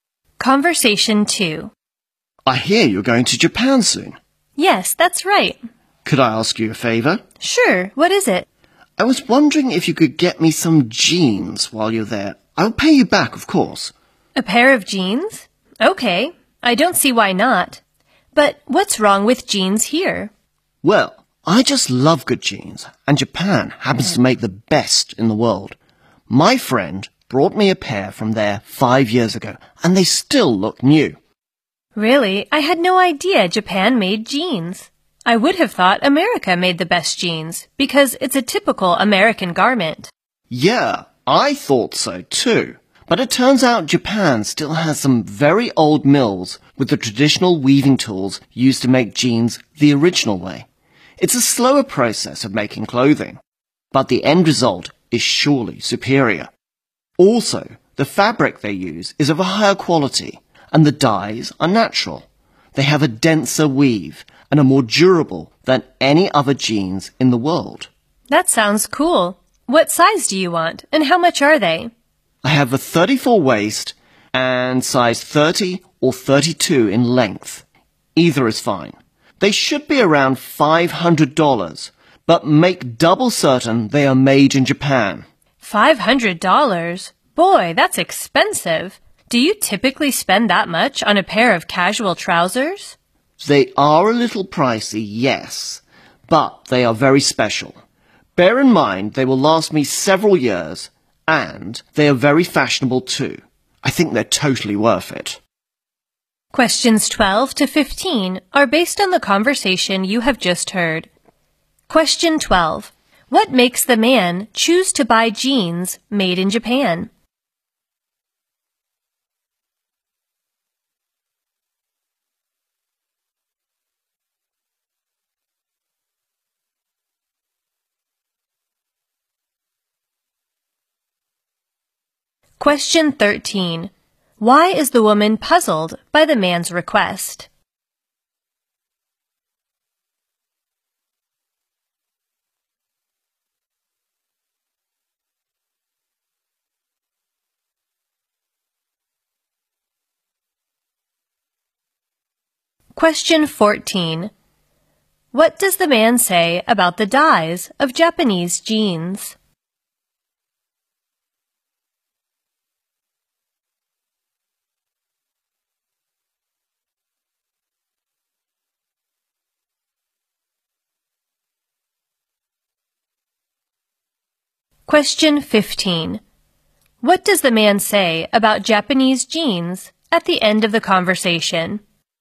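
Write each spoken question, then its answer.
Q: What makes the man choose to buy jeans made in Japan?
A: Japan makes the best jeans in the world.

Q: Why is the woman puzzled by the man's request?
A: She thought America made the best jeans.

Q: What does the man say about the dyes of Japanese jeans?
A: They are natural.

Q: What does the man say about Japanese jeans at the end of the conversation?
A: They are worth the price.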